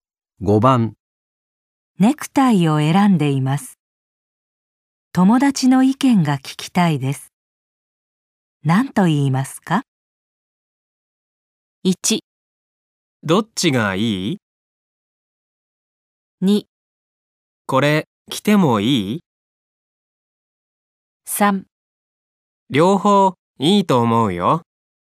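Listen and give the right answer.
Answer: 1: どっちがいい?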